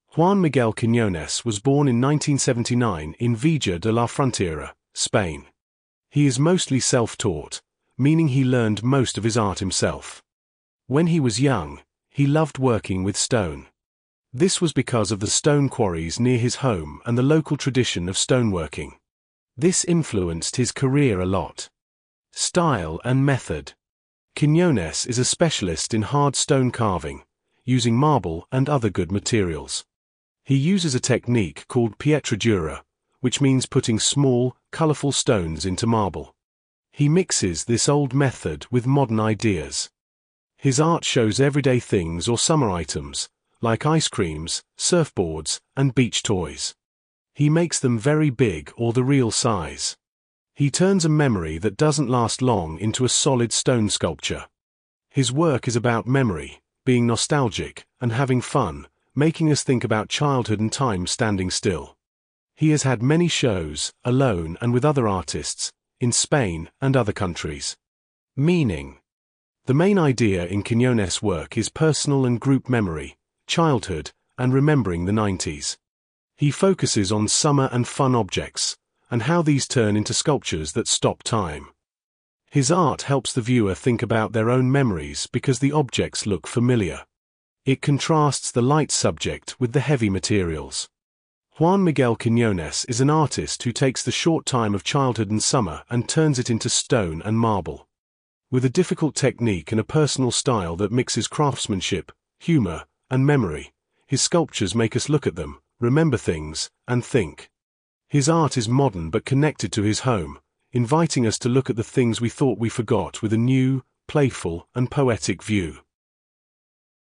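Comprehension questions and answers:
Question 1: How did Juan Miguel Quiñones primarily learn his art?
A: He is mostly self-taught.

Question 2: What influenced Quiñones' love for working with stone when he was young?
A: The stone quarries and stoneworking tradition near his home.

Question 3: What is the name of the technique Quiñones uses for putting small, colourful stones into marble?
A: Pietra dura

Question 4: Which items does Quiñones recreate in his sculptures?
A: Everyday things or summer items, like ice creams and surfboards

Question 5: What is the central theme in Quiñones' work regarding memory?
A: Personal and group memory, childhood, and the 90s

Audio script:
Juan Miguel Quiñones was born in 1979 in Vejer de la Frontera (Cádiz), Spain. He is mostly self-taught, meaning he learned most of his art himself. When he was young, he loved working with stone. This was because of the stone quarries near his home and the local tradition of stoneworking. 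This influenced his career a lot.
Style and Method
Quiñones is a specialist in hard stone carving, using marble and other good materials. He uses a technique called pietra dura, which means putting small, colourful stones into marble. He mixes this old method with modern ideas. His art shows everyday things or summer items—like ice creams, surfboards, and beach toys. He makes them very big or the real size. He turns a memory that doesn't last long into a solid stone sculpture. His work is about memory, being nostalgic, and having fun (humor), making us think about childhood and time standing still.
He has had many shows, alone and with other artists, in Spain and other countries.
Meaning
The main idea in Quiñones' work is personal and group memory, childhood, and remembering the 90s. He focuses on summer and fun objects, and how these turn into sculptures that "stop time." His art helps the viewer think about their own memories because the objects look familiar. 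It contrasts the light subject (toys, ice creams) with the heavy materials (marble, stone).
Juan Miguel Quiñones is an artist who takes the short time of childhood and summer and turns it into stone and marble. With a difficult technique and a personal style that mixes craftsmanship, humor, and memory, his sculptures make us look at them, remember things, and think. His art is modern but connected to his home, inviting us to look at the things we thought we forgot with a new, playful, and poetic view.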